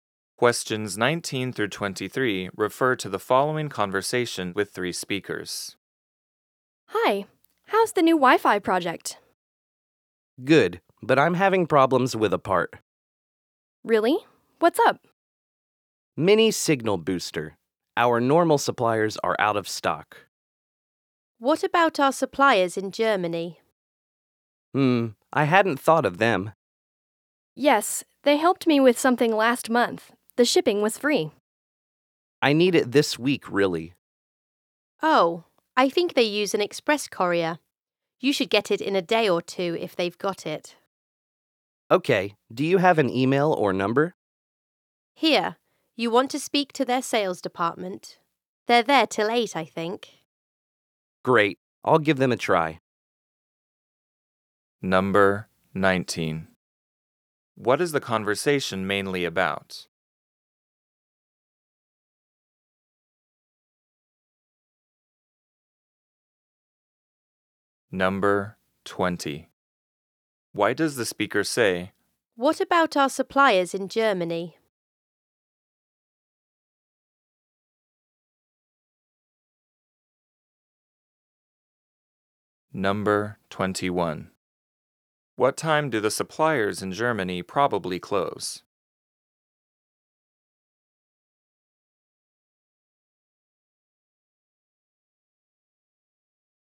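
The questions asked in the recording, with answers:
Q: What is the conversation mainly about?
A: Finding a supplier for a mini signal booster part

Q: Why does the speaker say,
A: To suggest another supplier that might have the part in stock

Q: What time do the suppliers in Germany probably close?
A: At 8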